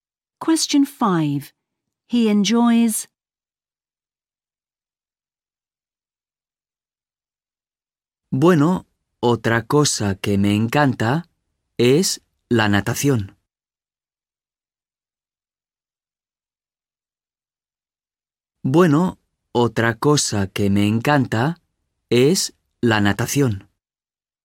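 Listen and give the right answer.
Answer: swimming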